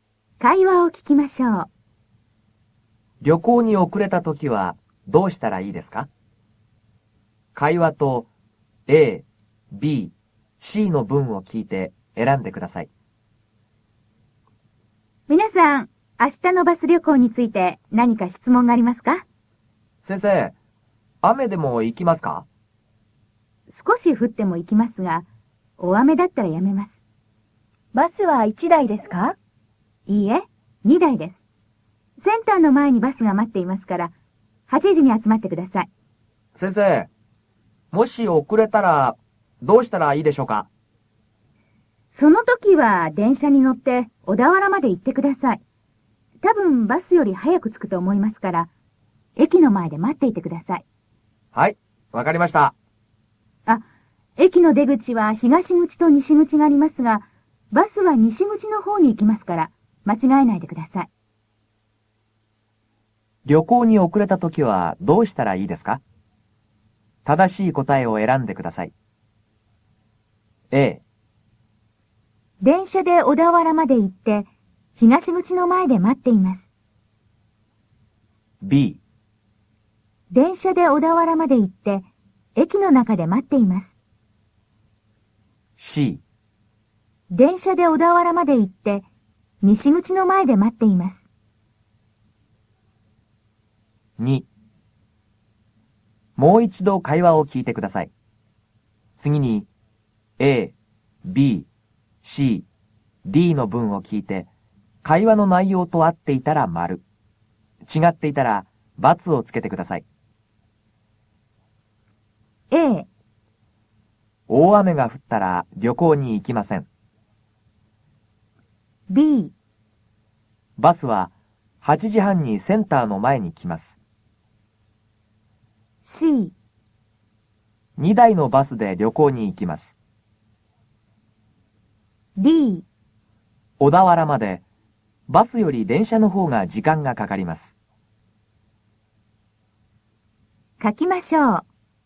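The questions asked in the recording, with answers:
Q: 旅行に遅れた時はどうしたらいいですか?正しい答えを選んでください。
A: C: 電車で小田原まで行って、西口の前で待っています。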